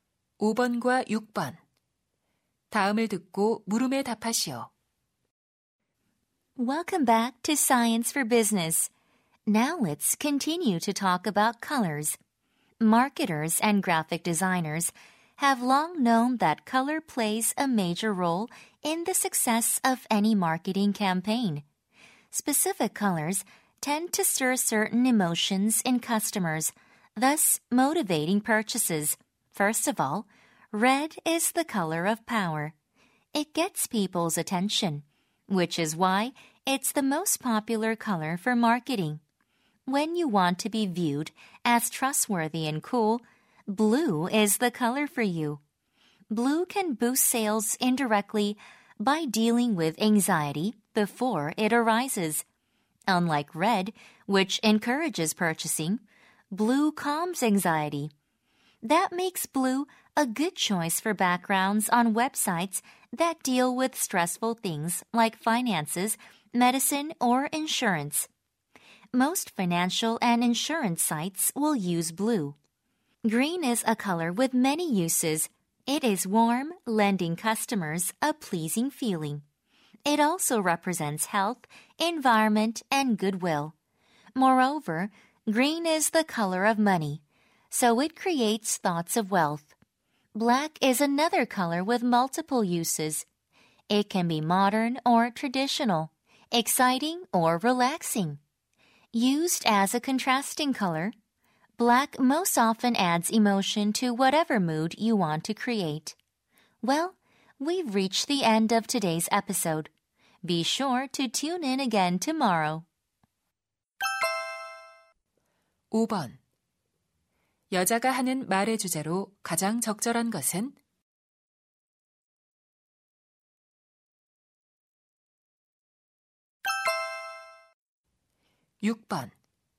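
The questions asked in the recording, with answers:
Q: 여자가 하는 말의 주제로 가장 적절한 것은?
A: 마케팅에서 색상이 고객의 감정과 구매에 미치는 영향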